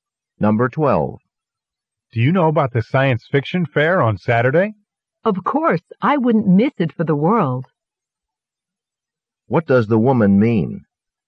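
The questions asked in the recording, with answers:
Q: What does the woman mean?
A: She will definitely go to the science fiction fair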